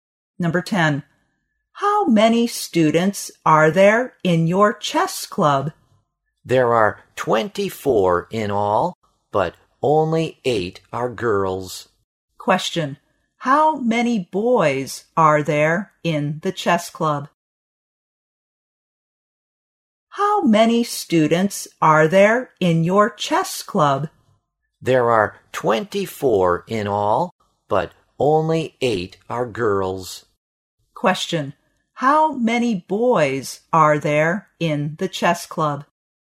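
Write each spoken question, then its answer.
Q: How many boys are there in the chess club?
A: 16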